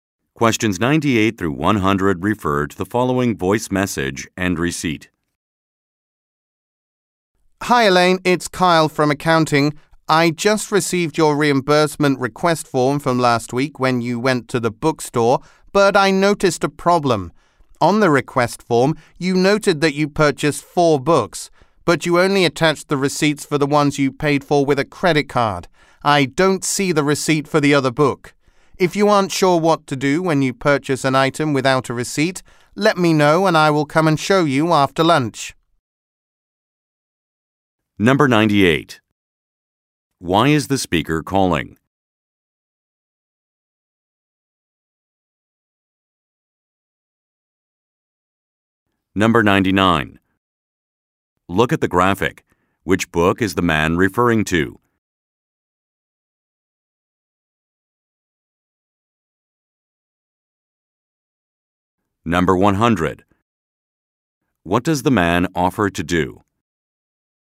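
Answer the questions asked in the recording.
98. To tell Elaine about a problem with her reimbursement request: a receipt is missing
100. Come after lunch and show her what to do when she buys something without a receipt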